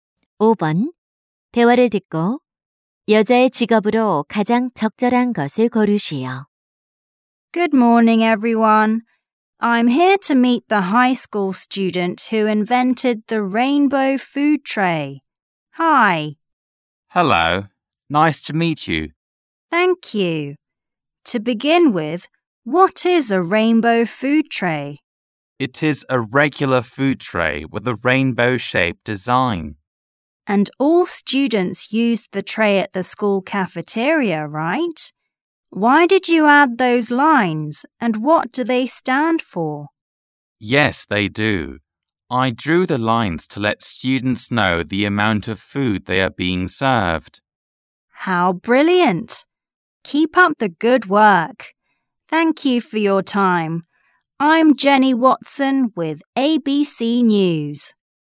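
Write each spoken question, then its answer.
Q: 대화를 듣고 여자의 직업으로 가장 적절한 것을 고르시오.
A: 기자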